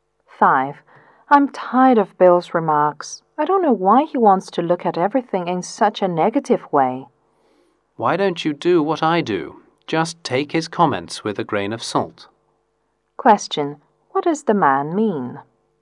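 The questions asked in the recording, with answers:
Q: What does the man mean?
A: Don't take Bill's comments too seriously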